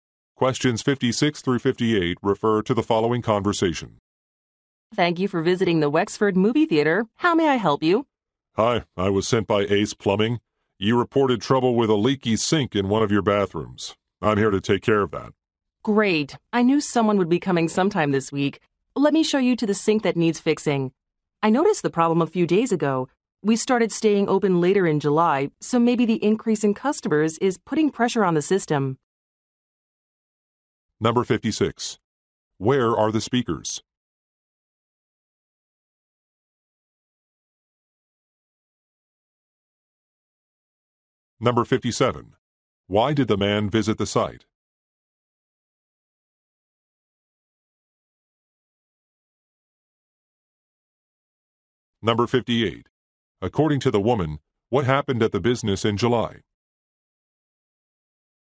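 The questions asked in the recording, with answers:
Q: Where are the speakers?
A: At a movie theater

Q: Why did the man visit the site?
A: To fix a leaky sink

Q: According to the woman, what happened at the business in July?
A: It started staying open later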